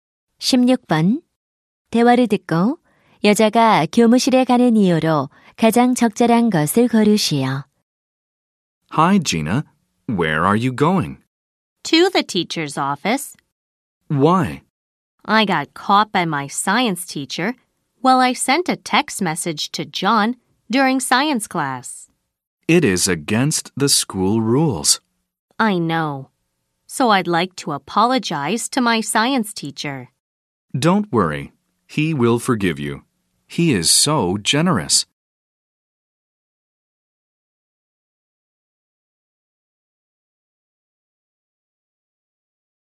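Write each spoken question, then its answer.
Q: 대화를 듣고 여자가 교무실에 가는 이유로 가장 적절한 것을 고르시오.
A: 과학 선생님께 사과하려고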